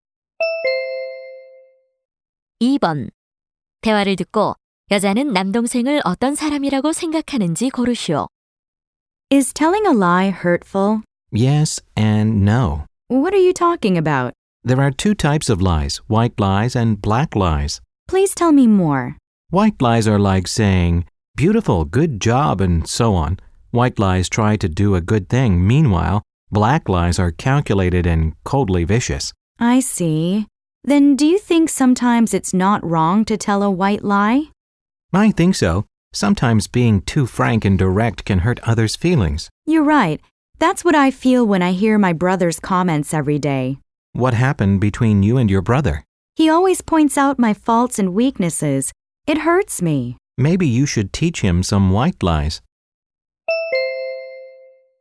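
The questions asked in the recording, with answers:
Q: 대화를 듣고 여자는 남동생을 어떤 사람이라고 생각하는지 고르시오.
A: 지나치게 솔직하고 직설적인 사람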